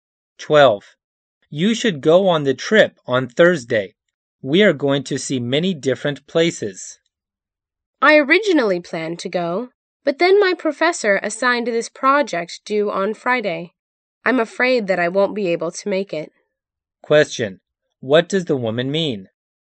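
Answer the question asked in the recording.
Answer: She can't go on the trip because of a project due Friday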